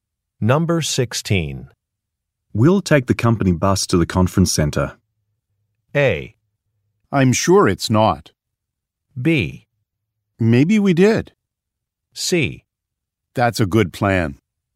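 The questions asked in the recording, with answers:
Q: We'll take the company bus to the conference center.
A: C: That's a good plan.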